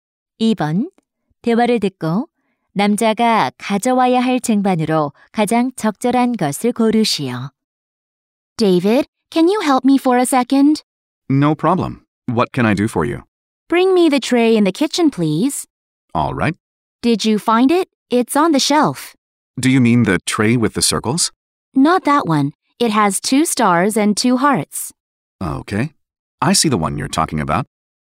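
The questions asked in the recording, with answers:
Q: 대화를 듣고 남자가 가져와야 할 쟁반으로 가장 적절한 것을 고르시오.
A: 별 두 개와 하트 두 개가 있는 쟁반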